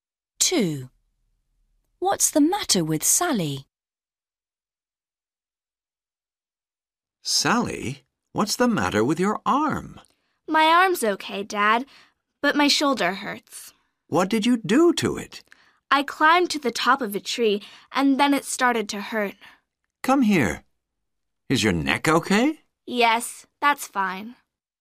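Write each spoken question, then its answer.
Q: What's the matter with Sally?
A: Her shoulder hurts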